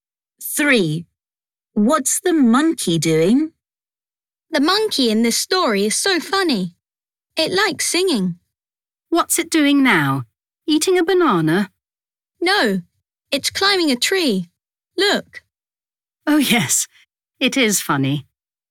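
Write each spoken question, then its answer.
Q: What's the monkey doing?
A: climbing a tree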